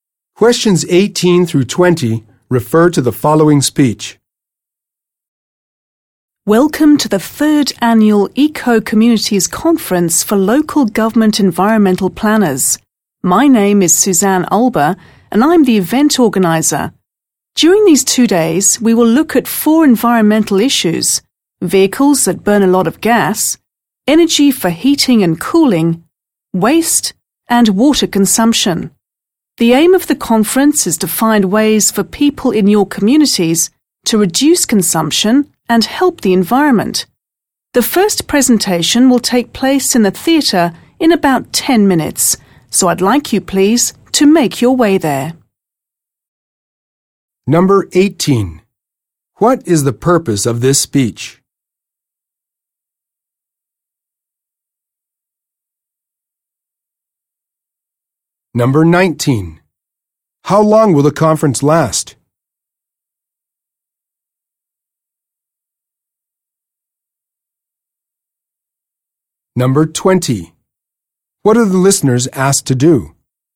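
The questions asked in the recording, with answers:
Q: What is the purpose of this speech?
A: To welcome people to the conference

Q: How long will the conference last?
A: 2 days

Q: What are the listeners asked to do?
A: Go to the theatre for the first presentation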